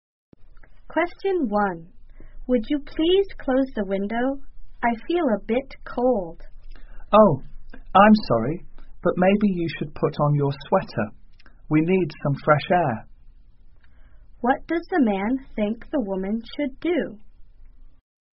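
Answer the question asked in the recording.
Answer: Put on her sweater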